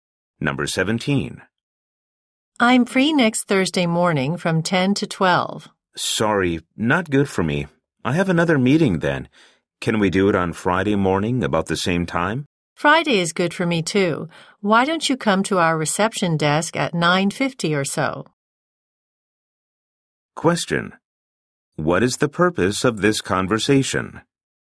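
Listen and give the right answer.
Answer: To schedule a meeting.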